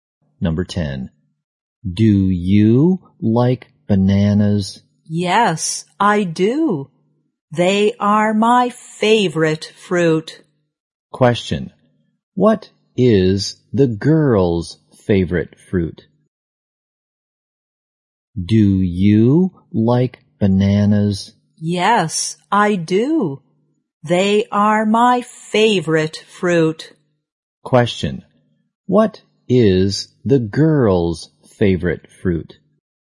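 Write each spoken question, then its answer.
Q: What is the girl's favorite fruit?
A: Bananas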